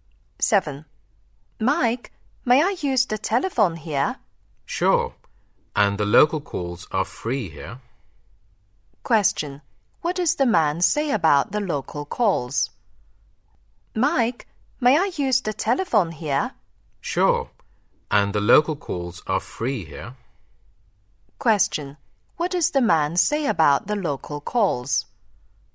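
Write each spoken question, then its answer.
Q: What does the man say about the local calls?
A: They are free.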